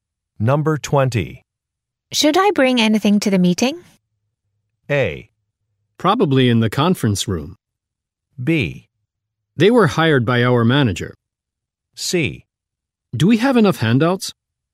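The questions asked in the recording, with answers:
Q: Should I bring anything to the meeting?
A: C: Do we have enough handouts?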